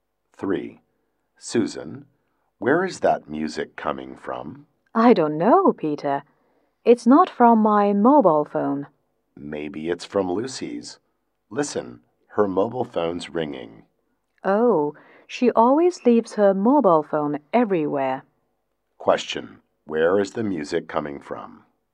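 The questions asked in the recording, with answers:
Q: Where is the music coming from?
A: Lucy's mobile phone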